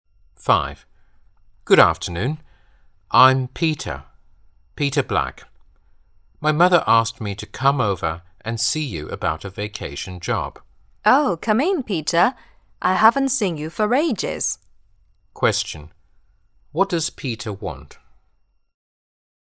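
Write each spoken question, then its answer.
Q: What does Peter want?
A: A vacation job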